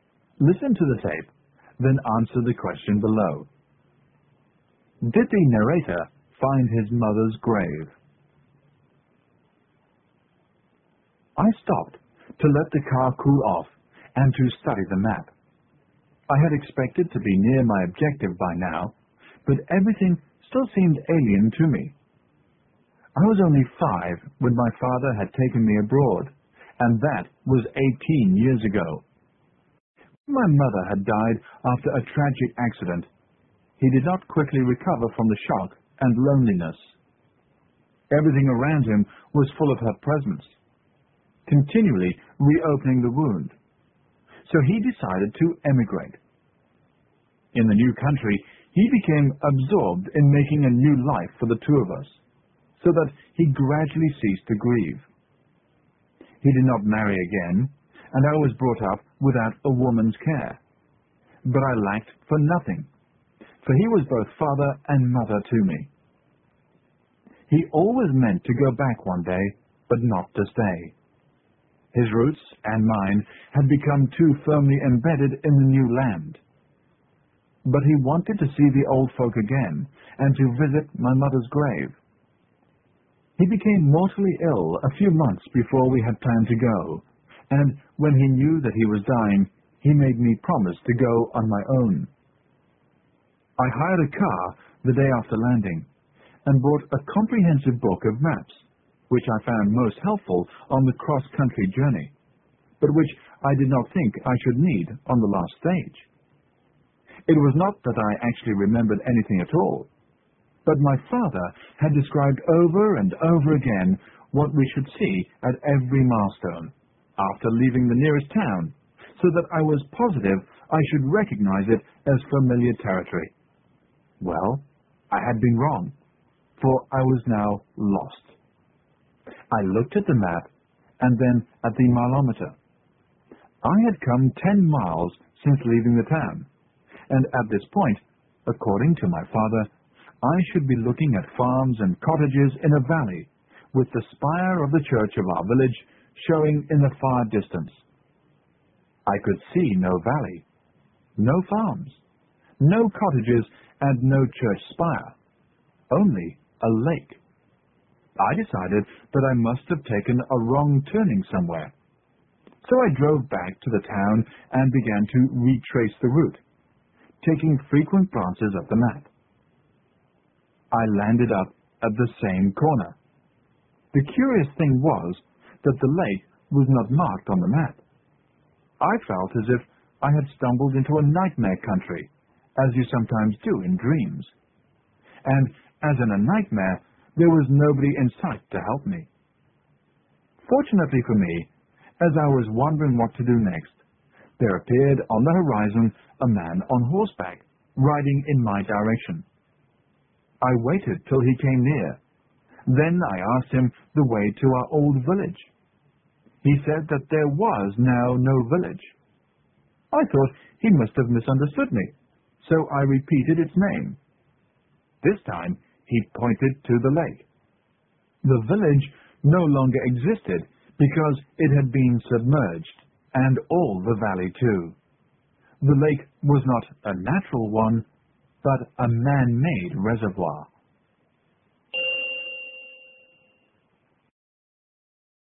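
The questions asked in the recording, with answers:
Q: Did the narrator find his mother's grave?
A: No, the village and its graves had been flooded by a man-made reservoir.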